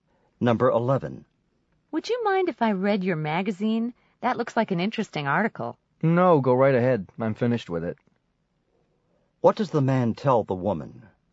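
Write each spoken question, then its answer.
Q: What does the man tell the woman?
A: She may read the magazine; he has finished it.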